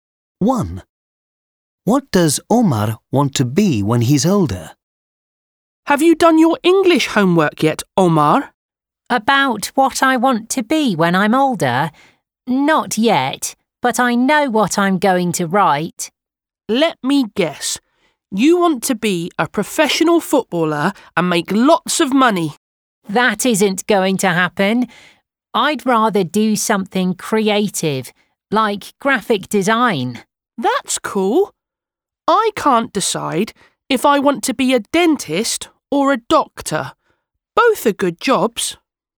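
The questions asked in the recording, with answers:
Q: What does Omar want to be when he's older?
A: a graphic designer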